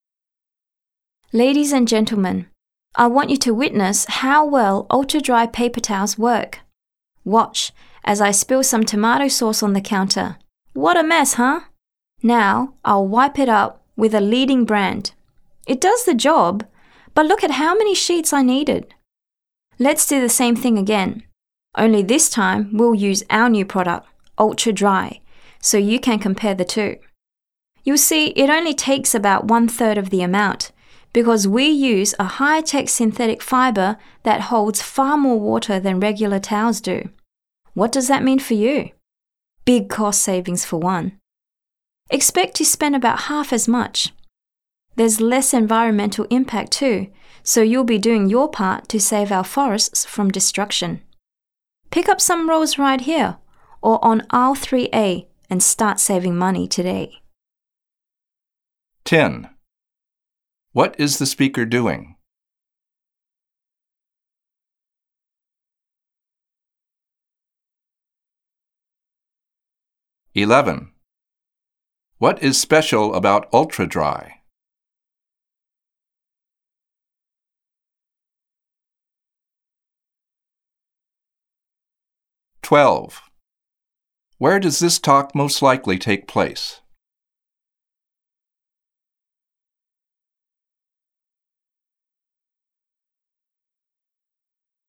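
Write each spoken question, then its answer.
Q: What is the speaker doing?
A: Demonstrating a paper towel product

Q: What is special about Ultra Dry?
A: It uses a high-tech synthetic fiber that holds far more water

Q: Where does this talk most likely take place?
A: In a store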